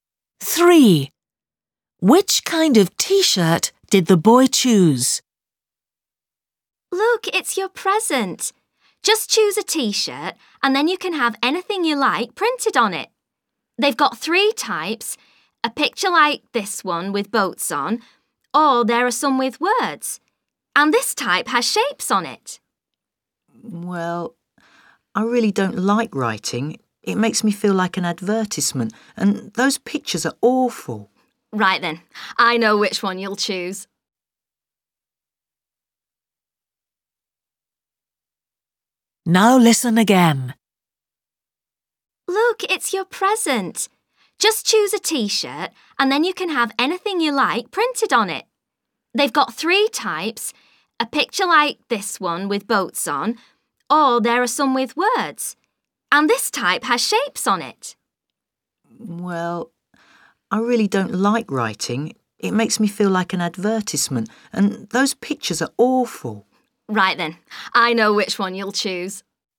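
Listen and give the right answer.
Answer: One with shapes on it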